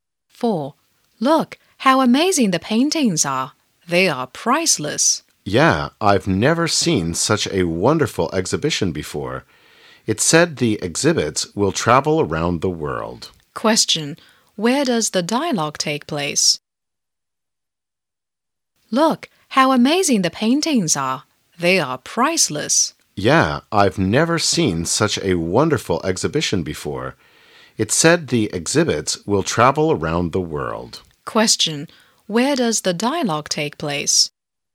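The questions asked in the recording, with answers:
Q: Where does the dialogue take place?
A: At an exhibition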